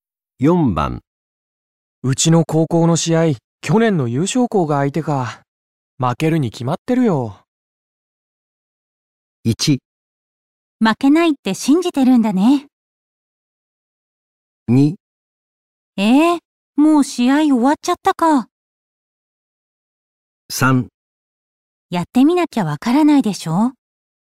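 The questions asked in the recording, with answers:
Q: うちの高校の試合、去年の優勝校が相手か。負けるに決まってるよ。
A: 3: やってみなきゃわからないでしょ。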